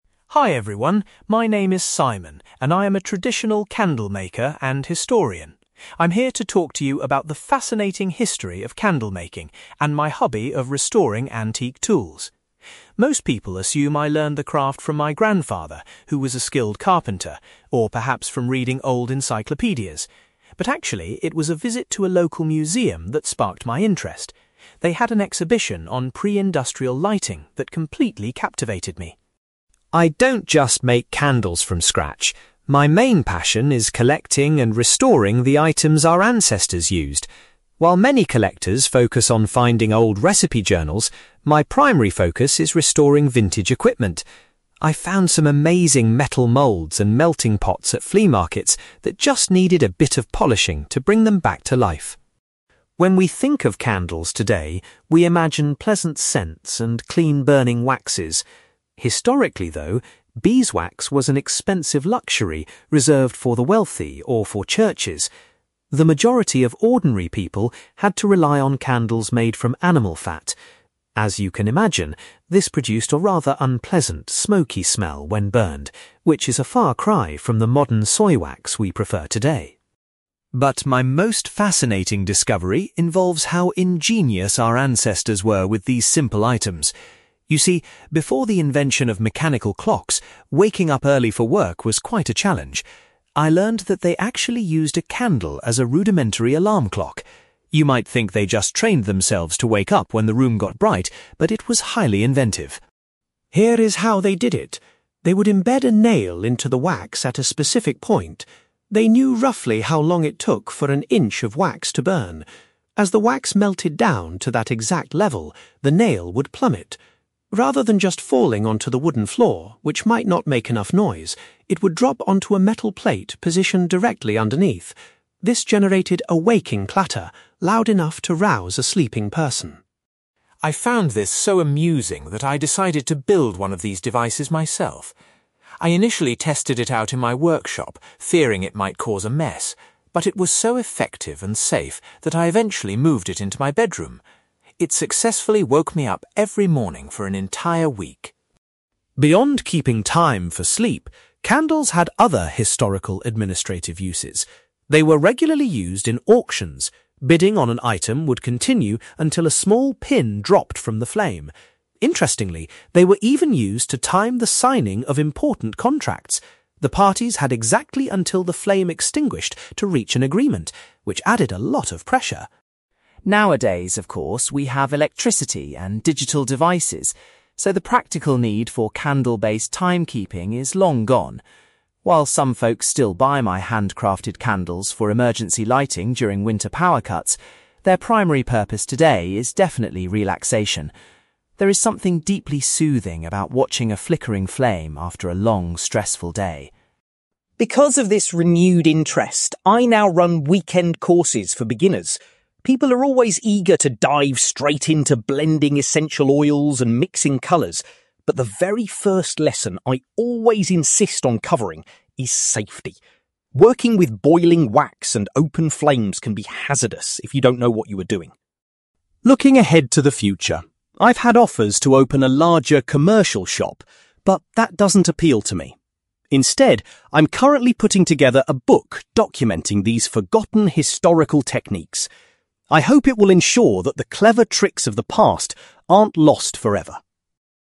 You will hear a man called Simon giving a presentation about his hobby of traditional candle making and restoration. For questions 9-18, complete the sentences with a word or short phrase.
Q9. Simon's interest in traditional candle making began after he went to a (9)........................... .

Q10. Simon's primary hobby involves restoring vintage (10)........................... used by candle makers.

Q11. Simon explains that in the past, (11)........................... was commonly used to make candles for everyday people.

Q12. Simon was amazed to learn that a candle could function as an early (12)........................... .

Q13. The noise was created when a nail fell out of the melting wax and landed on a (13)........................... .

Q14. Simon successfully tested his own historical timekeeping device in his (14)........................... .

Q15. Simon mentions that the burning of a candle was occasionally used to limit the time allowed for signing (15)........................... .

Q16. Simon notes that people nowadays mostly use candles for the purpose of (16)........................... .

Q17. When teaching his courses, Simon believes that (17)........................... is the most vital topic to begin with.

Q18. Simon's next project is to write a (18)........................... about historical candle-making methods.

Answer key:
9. museum
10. equipment
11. animal fat
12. alarm clock
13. metal plate
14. bedroom
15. contracts
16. relaxation
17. safety
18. book

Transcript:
Simon: Hi everyone, my name is Simon, and I'm a traditional candlemaker and historian. I'm here to talk to you about the fascinating history of candle making and my hobby of restoring antique tools. Most people assume I learned the craft from my grandfather, who was a skilled carpenter, or perhaps from reading old encyclopedias. But actually, it was a visit to a local museum that sparked my interest. They had an exhibition on pre-industrial lighting that completely captivated me.
I don't just make candles from scratch; my main passion is collecting and restoring the items our ancestors used. While many collectors focus on finding old recipe journals, my primary focus is restoring vintage equipment. I've found some amazing metal moulds and melting pots at flea markets that just needed a bit of polishing to bring them back to life.
When we think of candles today, we imagine pleasant scents and clean-burning waxes. Historically, though, beeswax was an expensive luxury reserved for the wealthy or for churches. The majority of ordinary people had to rely on candles made from animal fat. As you can imagine, this produced a rather unpleasant, smoky smell when burned, which is a far cry from the modern soy wax we prefer today.
But my most fascinating discovery involves how ingenious our ancestors were with these simple items. You see, before the invention of mechanical clocks, waking up early for work was quite a challenge. I learned that they actually used a candle as a rudimentary alarm clock. You might think they just trained themselves to wake up when the room got bright, but it was highly inventive.
Here is how they did it. They would embed a nail into the wax at a specific point. They knew roughly how long it took for an inch of wax to burn. As the wax melted down to that exact level, the nail would plummet. Rather than just falling onto the wooden floor, which might not make enough noise, it would drop onto a metal plate positioned directly underneath. This generated a waking clatter, loud enough to rouse a sleeping person.
I found this so amusing that I decided to build one of these devices myself. I initially tested it out in my workshop, fearing it might cause a mess, but it was so effective and safe that I eventually moved it into my bedroom! It successfully woke me up every morning for an entire week!
Beyond keeping time for sleep, candles had other historical administrative uses. They were regularly used in auctions; bidding on an item would continue until a small pin dropped from the flame. Interestingly, they were even used to time the signing of important contracts. The parties had exactly until the flame extinguished to reach an agreement, which added a lot of pressure!
Nowadays, of course, we have electricity and digital devices, so the practical need for candle-based timekeeping is long gone. While some folks still buy my handcrafted candles for emergency lighting during winter power cuts, their primary purpose today is definitely relaxation. There is something deeply soothing about watching a flickering flame after a long, stressful day.
Because of this renewed interest, I now run weekend courses for beginners. People are always eager to dive straight into blending essential oils and mixing colours, but the very first lesson I always insist on covering is safety. Working with boiling wax and open flames can be hazardous if you don't know what you are doing.
Looking ahead to the future, I've had offers to open a larger commercial shop, but that doesn't appeal to me. Instead, I'm currently putting together a book documenting these forgotten historical techniques. I hope it will ensure that the clever tricks of the past aren't lost forever.

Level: B2